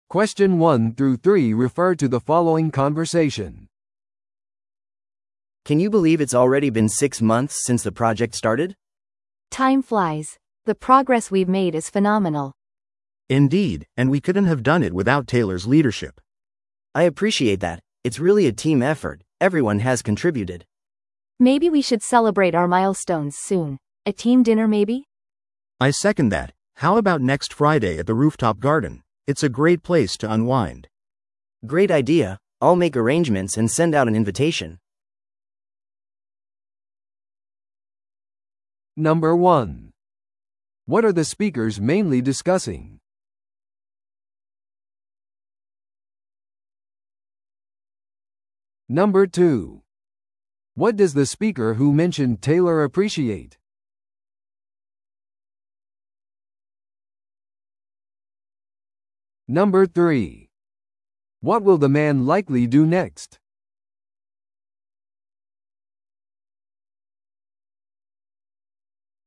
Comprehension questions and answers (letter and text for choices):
Listen to the audio below and answer the questions.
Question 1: What are the speakers mainly discussing?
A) プロジェクトのタイムラインに関する懸念。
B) チームのお祝いの計画。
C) より強固なリーダーシップの必要性。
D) 新しいチームメンバーの採用。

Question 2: What does the speaker who mentioned Taylor appreciate?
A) レポートのタイムリーな完成。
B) チームの個々の努力。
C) 上層部からの支援。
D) 彼らの努力の認識。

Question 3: What will the man likely do next?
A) お祝いのために屋上の庭を予約する。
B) テイラーとチームの進捗について話し合う。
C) 新しいプロジェクトマネージャーを探す。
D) リーダーシップスタイルに関するレポートを準備する。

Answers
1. B) チームのお祝いの計画。
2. D) 彼らの努力の認識。
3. A) お祝いのために屋上の庭を予約する。

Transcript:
A: Can you believe it's already been six months since the project started?
B: Time flies! The progress we've made is phenomenal.
C: Indeed, and we couldn't have done it without Taylor's leadership.
A: I appreciate that. It's really a team effort – everyone has contributed.
B: Maybe we should celebrate our milestones soon. A team dinner maybe?
C: I second that. How about next Friday at the rooftop garden? It's a great place to unwind.
A: Great idea! I'll make arrangements and send out an invitation.